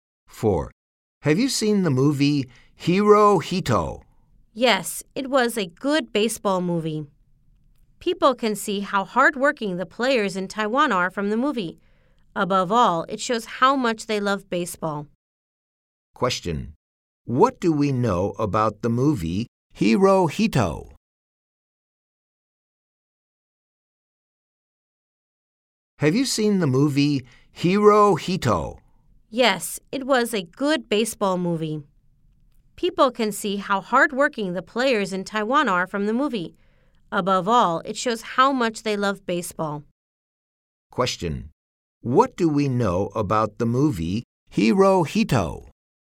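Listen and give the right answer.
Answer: It is a baseball movie showing how hardworking Taiwan's players are and how much they love baseball.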